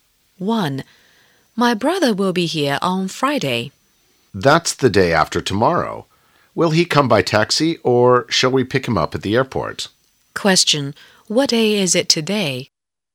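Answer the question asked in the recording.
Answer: Wednesday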